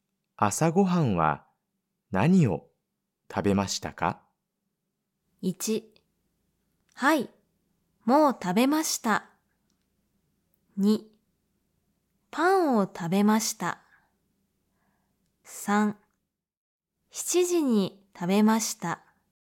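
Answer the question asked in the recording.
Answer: 2: パンを食べました。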